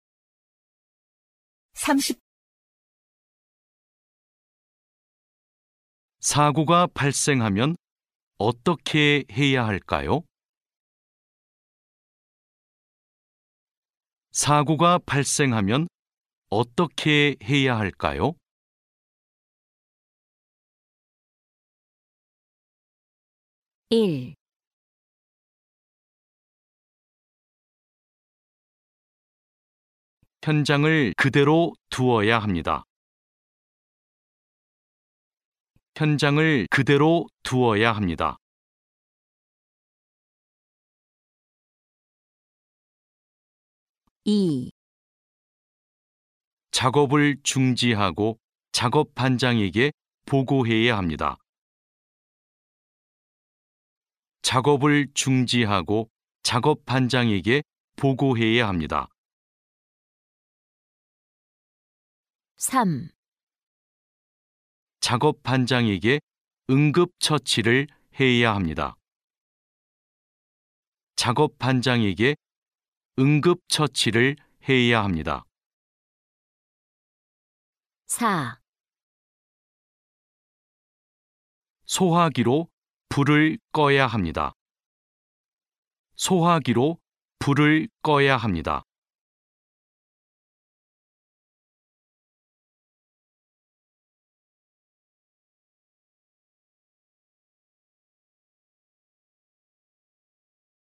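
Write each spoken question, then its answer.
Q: 사고가 발생하면 어떻게 해야 할까요?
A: 2: 작업을 중지하고 작업 반장에게 보고해야 합니다.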